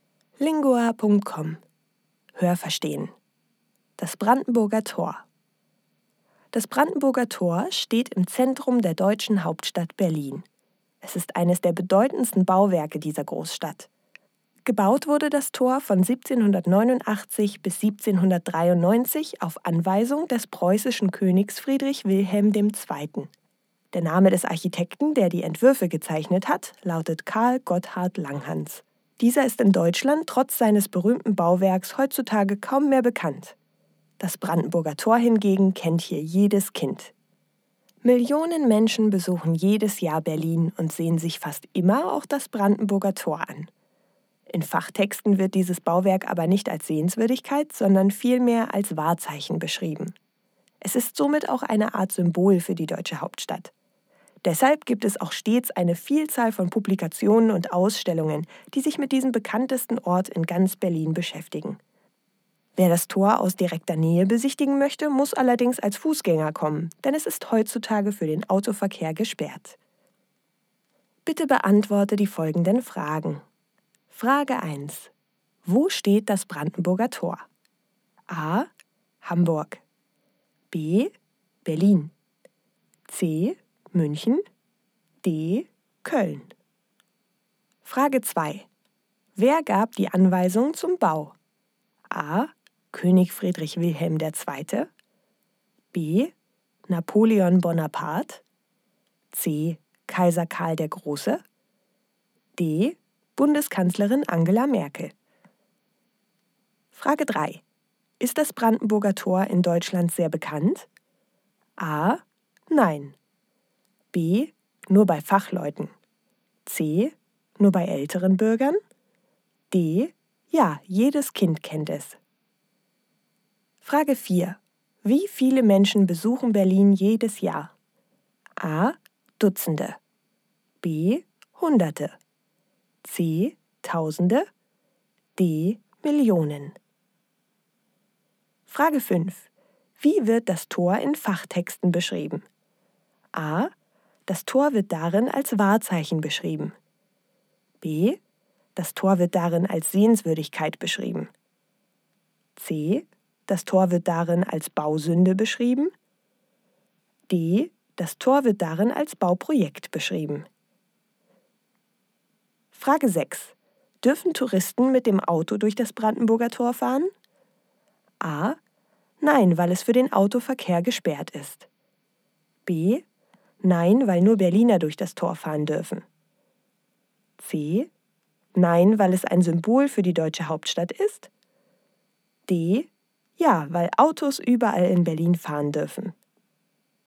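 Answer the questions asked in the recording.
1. B: Berlin
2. A: König Friedrich Wilhelm II.
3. D: Ja, jedes Kind kennt es.
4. D: Millionen
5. A: Das Tor wird darin als Wahrzeichen beschrieben.
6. A: Nein, weil es für den Autoverkehr gesperrt ist.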